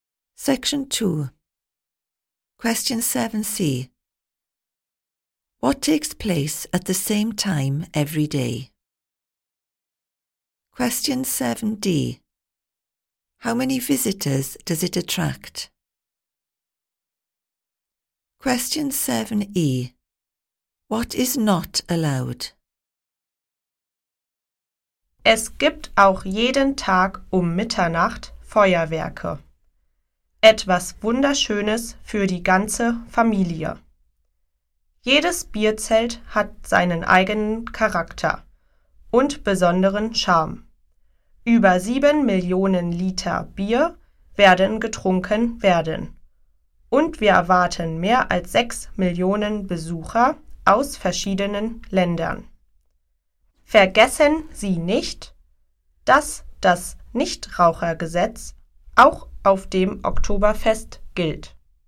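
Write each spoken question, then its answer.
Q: What takes place at the same time every day?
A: Fireworks at midnight

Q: How many visitors does it attract?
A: More than 6 million

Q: What is not allowed?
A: Smoking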